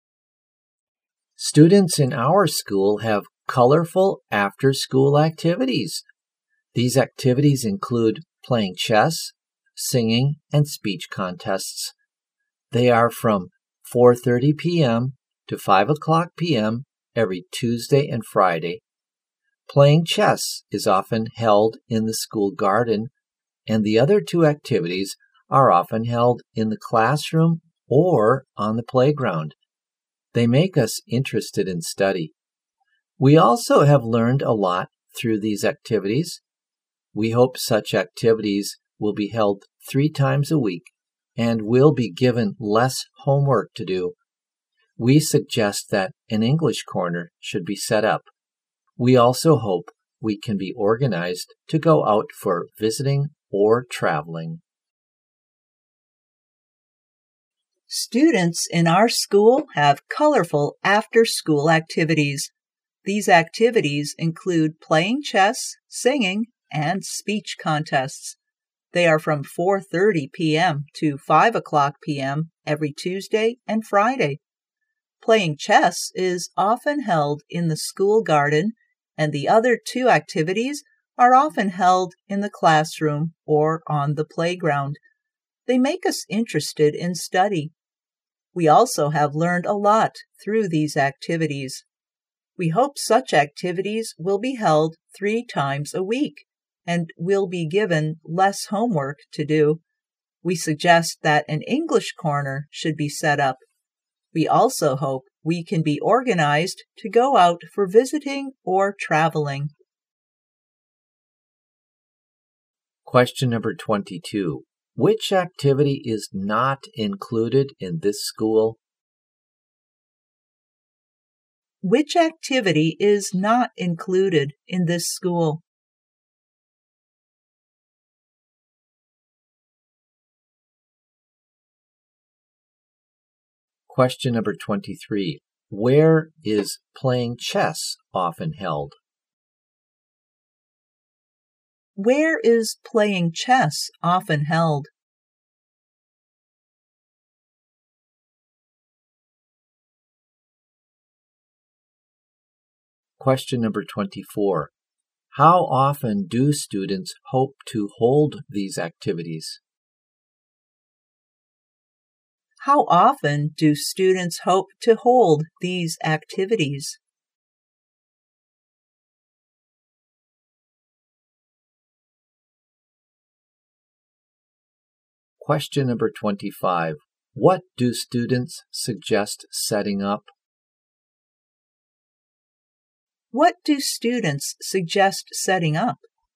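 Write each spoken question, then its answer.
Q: Where is playing chess often held?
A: In the school garden

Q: How often do students hope to hold these activities?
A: 3 times a week

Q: What do students suggest setting up?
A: An English corner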